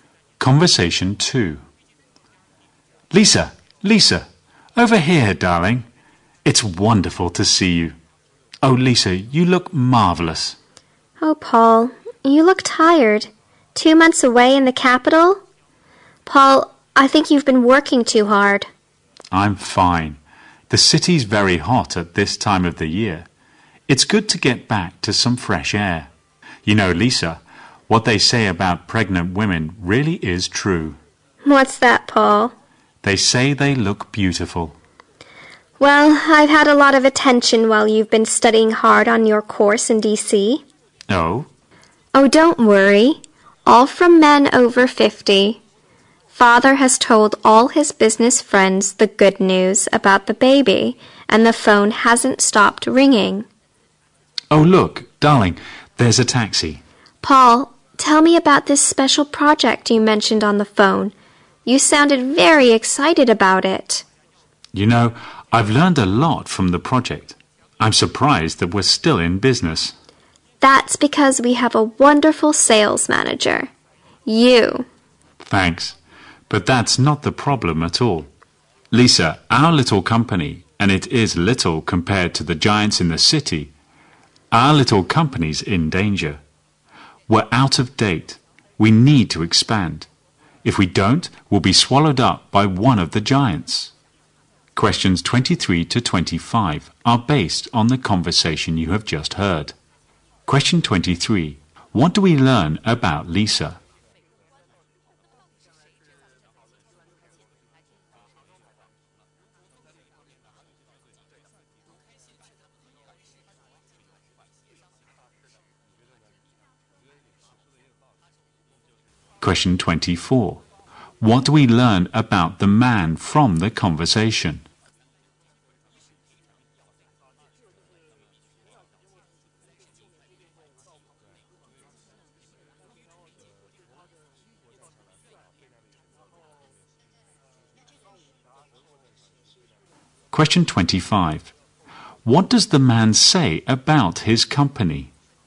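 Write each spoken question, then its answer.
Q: What do we learn about Lisa?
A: She is pregnant.

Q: What do we learn about the man from the conversation?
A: He has just come back from two months studying on a course in D.C.

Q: What does the man say about his company?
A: It is small and in danger; it needs to expand.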